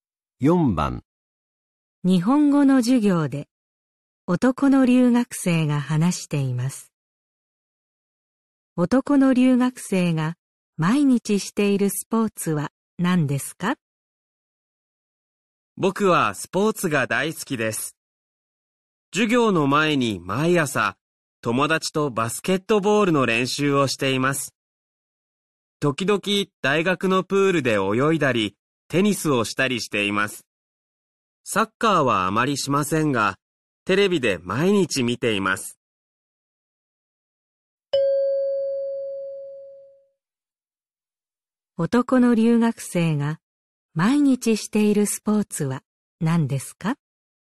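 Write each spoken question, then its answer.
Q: 男の留学生が毎日しているスポーツは何ですか?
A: バスケットボール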